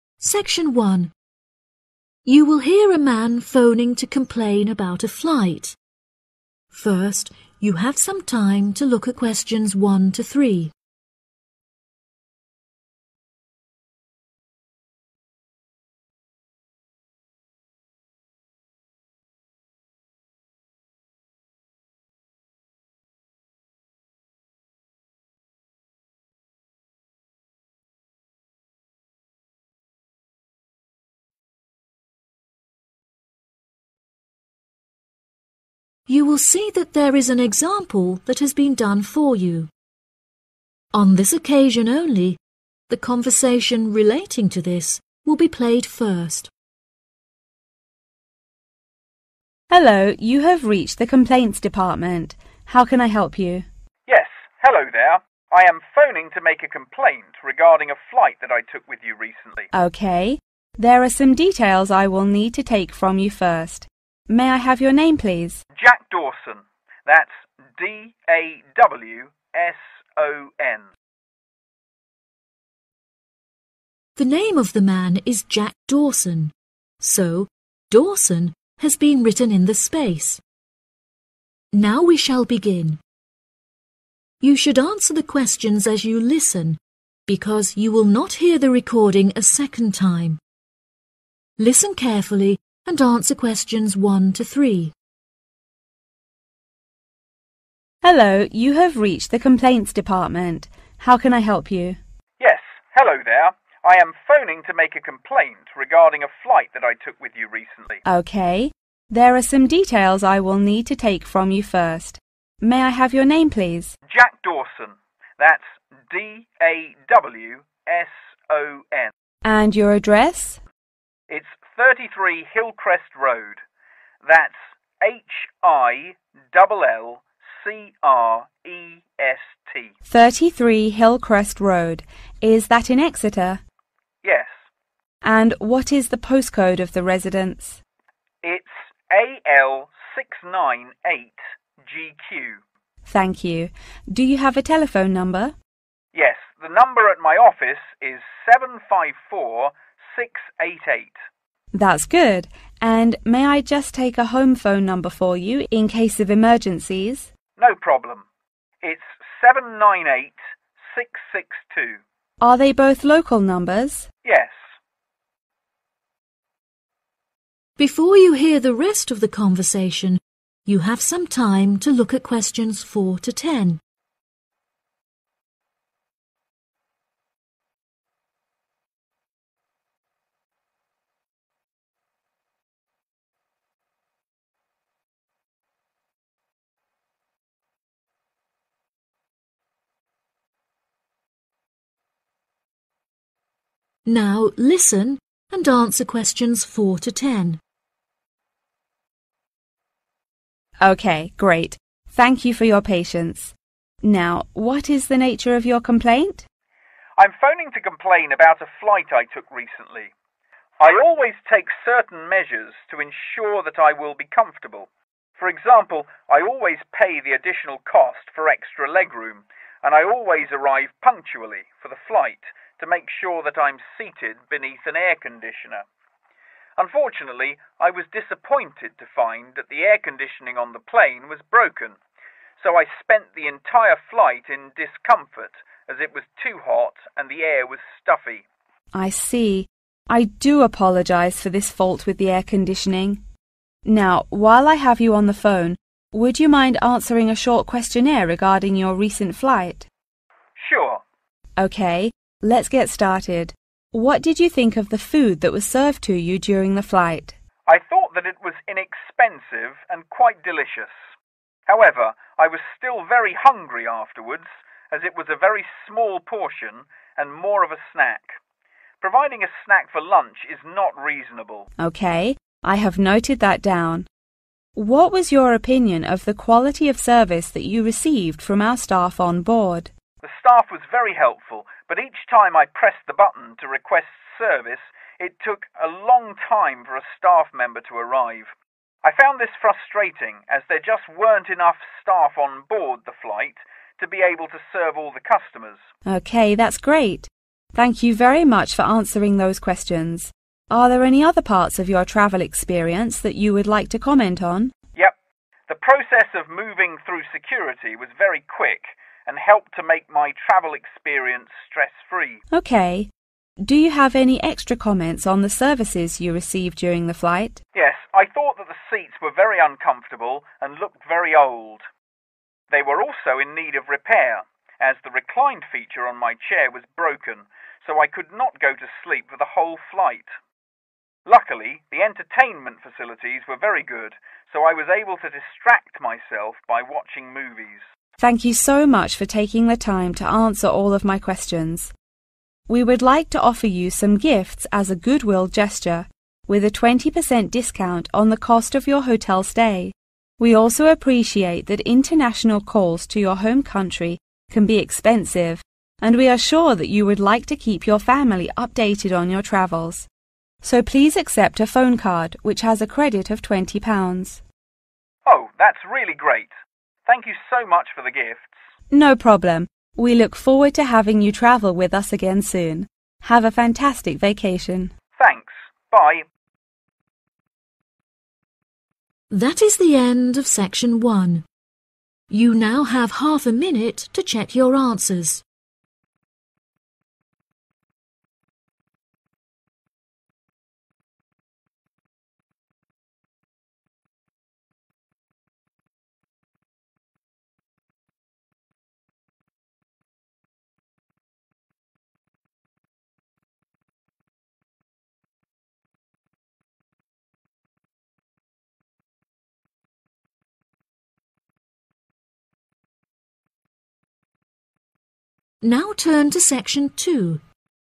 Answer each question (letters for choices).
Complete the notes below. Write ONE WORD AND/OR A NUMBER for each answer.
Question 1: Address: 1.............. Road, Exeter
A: 33 Hillcrest

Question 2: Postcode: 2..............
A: AL698GQ

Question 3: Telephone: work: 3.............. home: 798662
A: 754688

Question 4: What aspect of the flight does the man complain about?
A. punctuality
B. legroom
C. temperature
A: C

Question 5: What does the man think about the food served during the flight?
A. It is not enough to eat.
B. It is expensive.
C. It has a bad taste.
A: A

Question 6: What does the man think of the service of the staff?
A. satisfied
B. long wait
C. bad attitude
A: B

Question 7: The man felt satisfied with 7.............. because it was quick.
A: security (process)

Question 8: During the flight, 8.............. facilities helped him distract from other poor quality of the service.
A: entertainment

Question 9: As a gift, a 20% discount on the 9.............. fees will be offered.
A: hotel

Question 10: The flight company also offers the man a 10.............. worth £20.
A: phone card